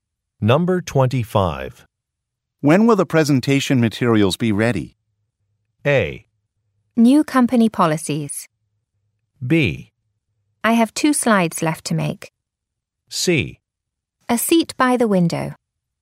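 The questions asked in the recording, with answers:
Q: When will the presentation materials be ready?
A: B: I have 2 slides left to make.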